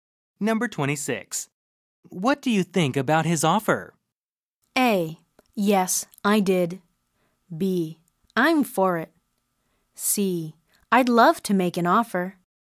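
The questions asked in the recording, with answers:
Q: What do you think about his offer?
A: B: I'm for it.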